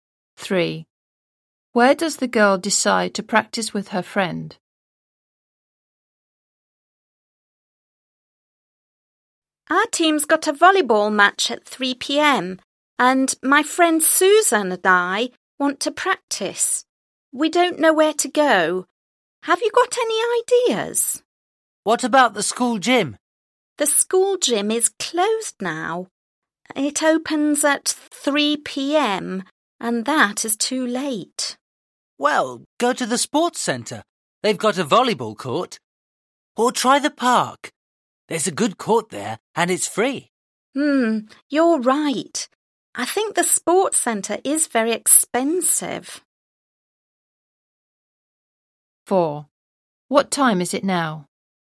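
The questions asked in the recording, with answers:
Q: Where does the girl decide to practice with her friend?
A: In the park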